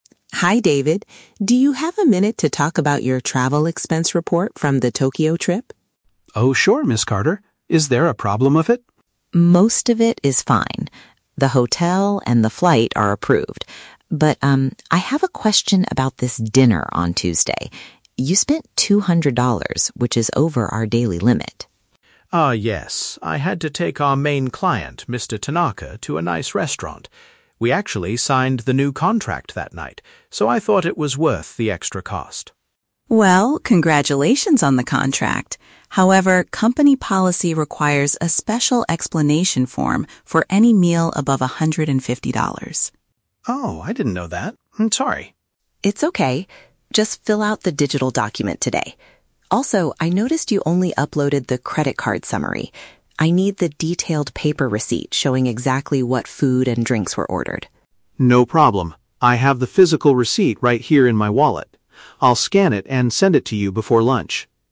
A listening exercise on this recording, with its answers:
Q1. Why does the accountant want to speak with David?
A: To discuss a specific meal that cost too much money.

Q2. What is David required to do because he exceeded the budget?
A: Complete an additional document explaining the situation.

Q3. What item is currently missing from David's expense report?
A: An itemized bill showing the specific items they consumed.

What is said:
Carter: Hi David, do you have a minute to talk about your travel expense report from the Tokyo trip?
David: Oh, sure, Ms. Carter. Is there a problem with it?
Carter: Most of it is fine. The hotel and the flight are approved. But, um, I have a question about this dinner on Tuesday. You spent two hundred dollars, which is over our daily limit.
I had to take our main client, Mr. Tanaka, to a nice restaurant. We actually signed the new contract that night, so I thought it was worth the extra cost.
Carter: Well, congratulations on the contract! However, company policy requires a special explanation form for any meal above one hundred and fifty dollars.
David: Oh, I didn't know that. I'm sorry.
Carter: It's okay. Just fill out the digital document today. Also, I noticed you only uploaded the credit card summary. I need the detailed paper receipt showing exactly what food and drinks were ordered.
David: No problem. I have the physical receipt right here in my wallet. I'll scan it and send it to you before lunch.